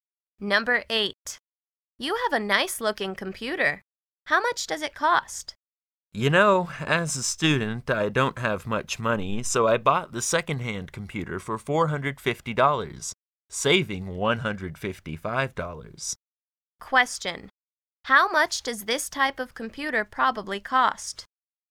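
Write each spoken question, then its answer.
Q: How much does this type of computer probably cost?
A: $605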